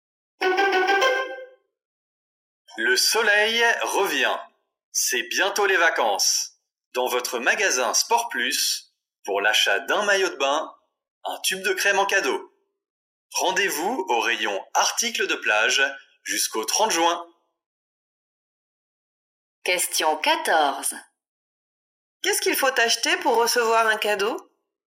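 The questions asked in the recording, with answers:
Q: Qu'est-ce qu'il faut acheter pour recevoir un cadeau?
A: Un maillot de bain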